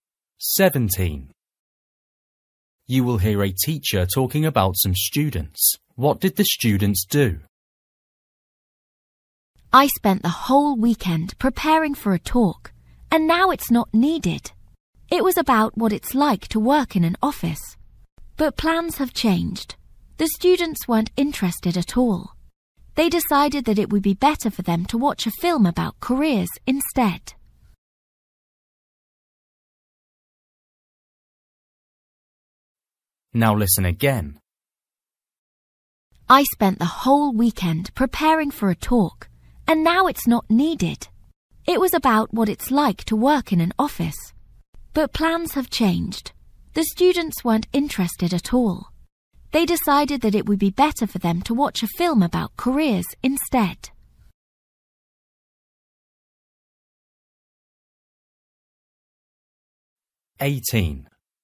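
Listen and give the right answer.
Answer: They chose to watch a film about careers instead of the talk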